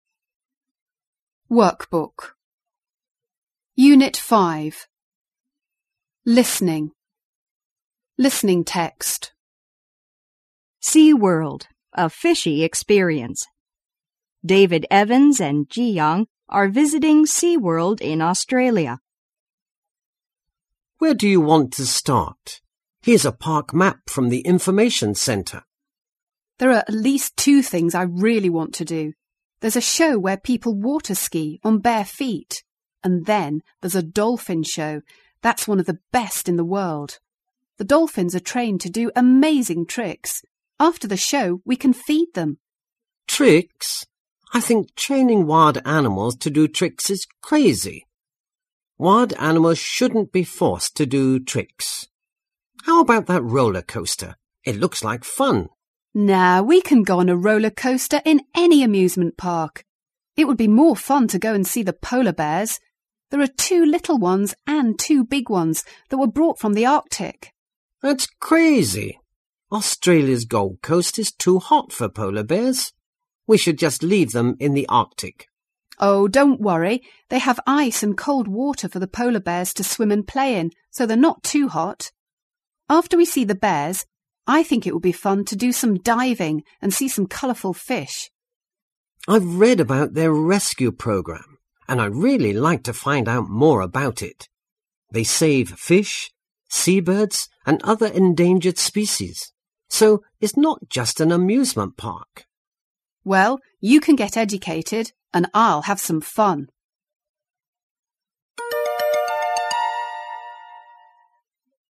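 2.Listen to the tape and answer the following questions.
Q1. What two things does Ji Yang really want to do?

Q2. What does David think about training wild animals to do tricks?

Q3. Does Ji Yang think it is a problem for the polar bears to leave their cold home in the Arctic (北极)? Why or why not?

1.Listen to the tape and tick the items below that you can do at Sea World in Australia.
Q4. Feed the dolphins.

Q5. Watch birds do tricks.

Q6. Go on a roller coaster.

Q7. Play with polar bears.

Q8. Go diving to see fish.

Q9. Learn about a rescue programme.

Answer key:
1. See the barefoot water-skiing show and the dolphin show.
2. He thinks it is crazy; wild animals shouldn't be forced to do tricks.
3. No, because they have ice and cold water to swim and play in, so they're not too hot.
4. Yes, you can.
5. No, this is not mentioned.
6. Yes, you can.
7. No, you can only see them.
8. Yes, you can.
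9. Yes, you can.

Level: 高中英语必修四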